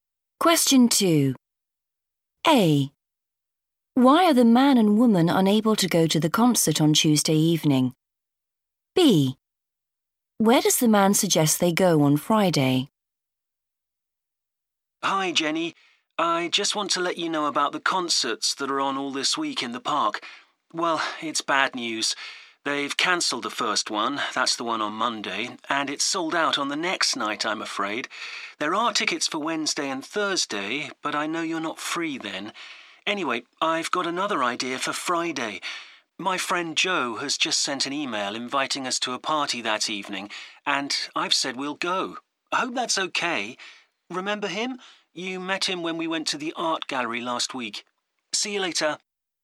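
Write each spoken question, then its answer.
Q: Why are the man and woman unable to go to the concert on Tuesday evening?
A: it's sold out

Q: Where does the man suggest they go on Friday?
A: to a party (Joe's)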